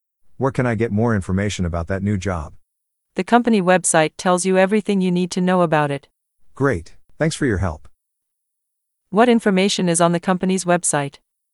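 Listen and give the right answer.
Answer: Everything about the new job.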